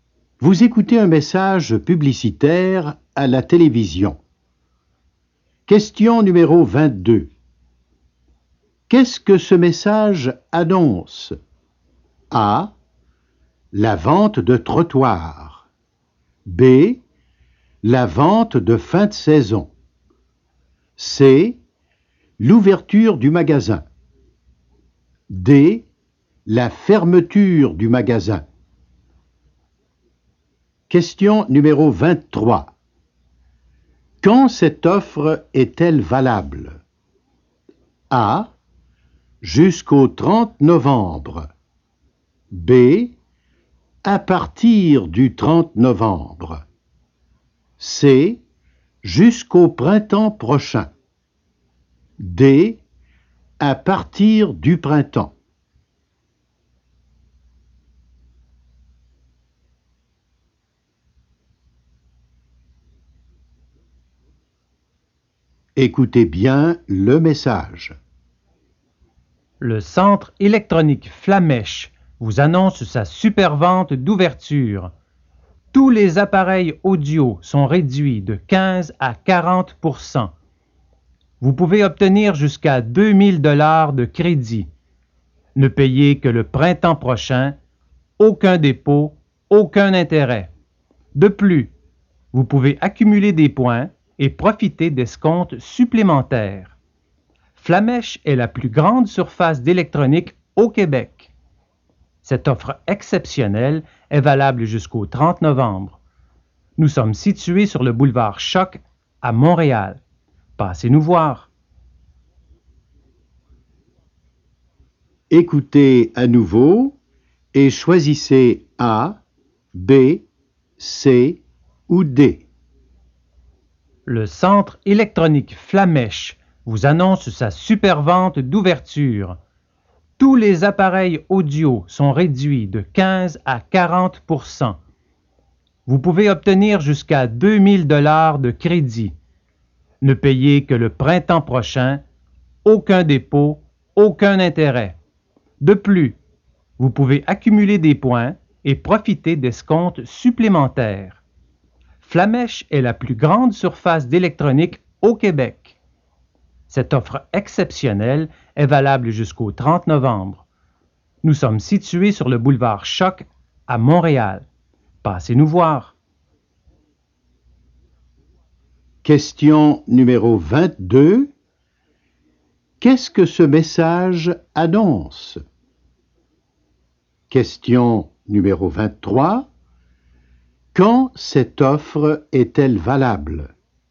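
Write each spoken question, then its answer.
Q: Qu'est-ce que ce message annonce?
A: C: L'ouverture du magasin.

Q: Quand cette offre est-elle valable?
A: A: Jusqu'au 30 novembre.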